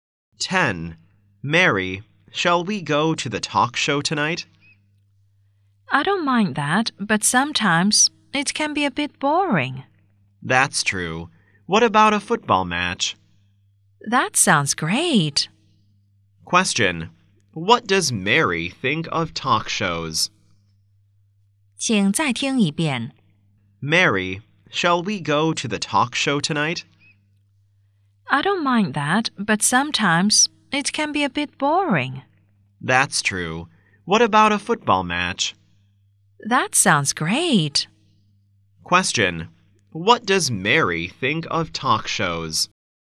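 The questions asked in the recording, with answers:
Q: Question. What does Mary think of talk shows?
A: They can be a bit boring sometimes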